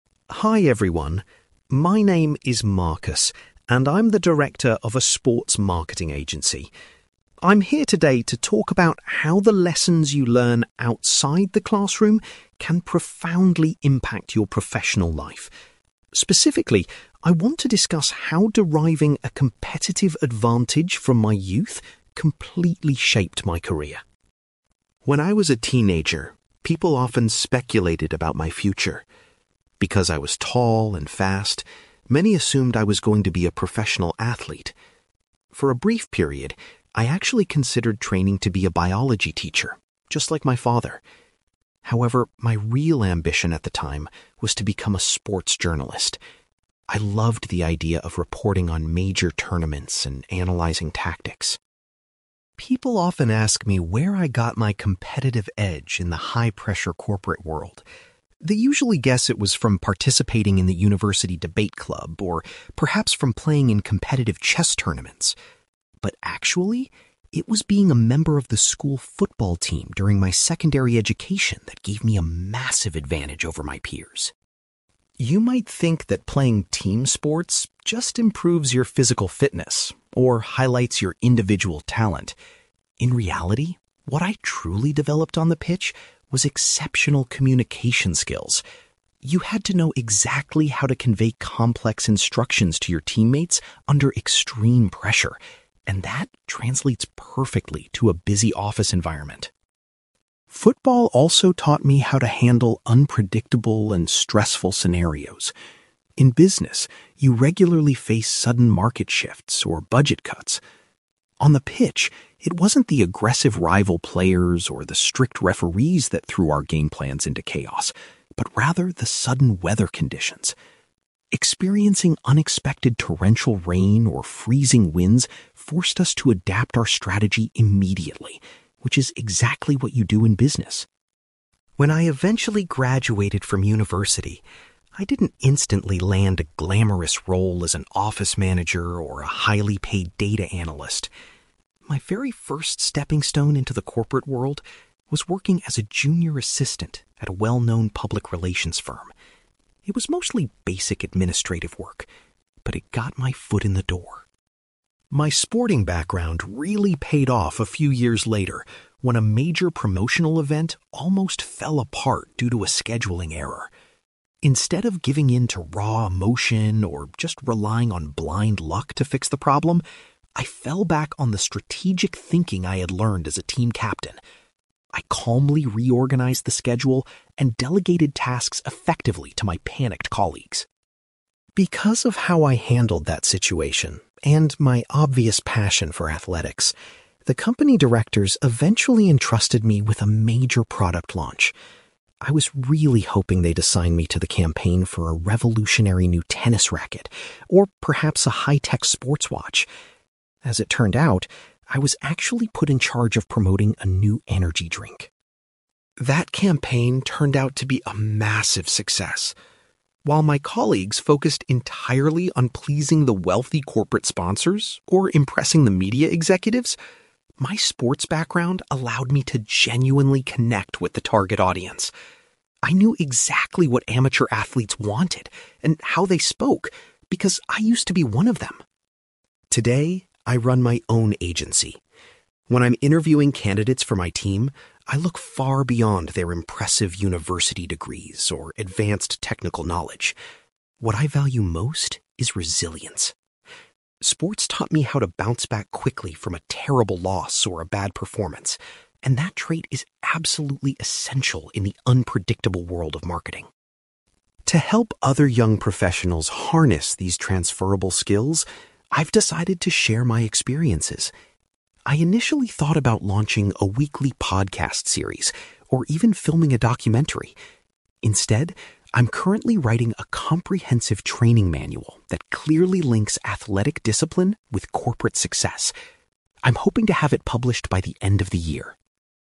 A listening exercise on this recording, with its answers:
You will hear a man called Marcus giving a presentation about how playing sports helped his career. For questions 9-18, complete the sentences with a word or short phrase.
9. Marcus states that his original career aspiration was to work as a (9)........................... .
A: sports journalist

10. Marcus believes that participating in the (10)........................... provided him with an unexpected edge in the business world.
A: school football team

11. Marcus highlights that his time on the pitch helped him cultivate vital (11)........................... rather than just fitness.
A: communication skills

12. Marcus compares dealing with business crises to handling sudden changes in (12)........................... during a match.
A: weather conditions

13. Marcus began his professional journey in the corporate sector as a (13)........................... .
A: junior assistant

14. When faced with a workplace crisis, Marcus utilized his (14)........................... to resolve the issue smoothly.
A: strategic thinking

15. Due to his athletic past, Marcus was assigned to manage the marketing campaign for an (15)........................... .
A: energy drink

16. Marcus attributes the success of his campaign to having a deep understanding of the (16)........................... .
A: target audience

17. When recruiting new staff members, Marcus considers (17)........................... to be the most important quality.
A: resilience

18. Marcus is presently focused on creating a (18)........................... to assist others in applying sports skills to business.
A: training manual

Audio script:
Marcus: Hi everyone, my name is Marcus, and I'm the director of a sports marketing agency. I'm here today to talk about how the lessons you learn outside the classroom can profoundly impact your professional life. Specifically, I want to discuss how deriving a competitive advantage from my youth completely shaped my career.
When I was a teenager, people often speculated about my future. Because I was tall and fast, many assumed I was going to be a professional athlete. For a brief period, I actually considered training to be a biology teacher, just like my father. However, my real ambition at the time was to become a sports journalist. I loved the idea of reporting on major tournaments and analyzing tactics.
People often ask me where I got my competitive edge in the high-pressure corporate world. They usually guess it was from participating in the university debate club, or perhaps from playing in competitive chess tournaments. But actually, it was being a member of the school football team during my secondary education that gave me a massive advantage over my peers.
You might think that playing team sports just improves your physical fitness or highlights your individual talent. In reality, what I truly developed on the pitch was exceptional communication skills. You had to know exactly how to convey complex instructions to your teammates under extreme pressure, and that translates perfectly to a busy office environment.
Football also taught me how to handle unpredictable and stressful scenarios. In business, you regularly face sudden market shifts or budget cuts. On the pitch, it wasn't the aggressive rival players or the strict referees that threw our game plans into chaos, but rather the sudden weather conditions. Experiencing unexpected torrential rain or freezing winds forced us to adapt our strategy immediately, which is exactly what you do in business.
When I eventually graduated from university, I didn't instantly land a glamorous role as an office manager or a highly-paid data analyst. My very first stepping stone into the corporate world was working as a junior assistant at a well-known public relations firm. It was mostly basic administrative work, but it got my foot in the door.
My sporting background really paid off a few years later when a major promotional event almost fell apart due to a scheduling error. Instead of giving in to raw emotion or just relying on blind luck to fix the problem, I fell back on the strategic thinking I had learned as a team captain. I calmly reorganized the schedule and delegated tasks effectively to my panicked colleagues.
Because of how I handled that situation, and my obvious passion for athletics, the company directors eventually entrusted me with a major product launch. I was really hoping they'd assign me to the campaign for a revolutionary new tennis racket or perhaps a high-tech sports watch. As it turned out, I was actually put in charge of promoting a new energy drink.
That campaign turned out to be a massive success. While my colleagues focused entirely on pleasing the wealthy corporate sponsors or impressing the media executives, my sports background allowed me to genuinely connect with the target audience. I knew exactly what amateur athletes wanted and how they spoke, because I used to be one of them.
Today, I run my own agency. When I'm interviewing candidates for my team, I look far beyond their impressive university degrees or advanced technical knowledge. What I value most is resilience. Sports taught me how to bounce back quickly from a terrible loss or a bad performance, and that trait is absolutely essential in the unpredictable world of marketing.
To help other young professionals harness these transferable skills, I've decided to share my experiences. I initially thought about launching a weekly podcast series, or even filming a documentary. Instead, I'm currently writing a comprehensive training manual that clearly links athletic discipline with corporate success. I'm hoping to have it published by the end of the year.

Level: B2